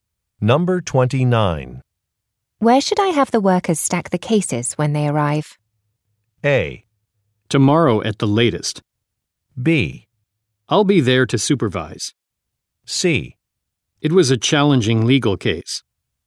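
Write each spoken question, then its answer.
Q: Where should I have the workers stack the cases when they arrive?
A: B: I'll be there to supervise.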